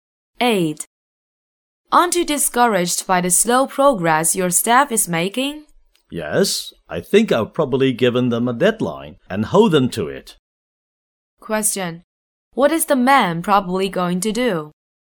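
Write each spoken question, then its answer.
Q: What is the man probably going to do?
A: Give his staff a deadline and hold them to it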